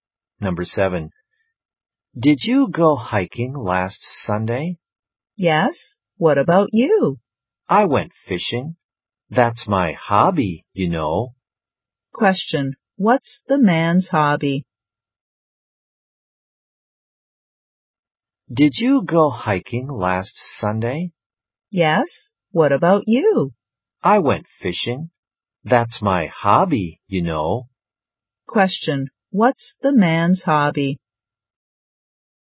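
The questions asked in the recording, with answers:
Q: What's the man's hobby?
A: Fishing.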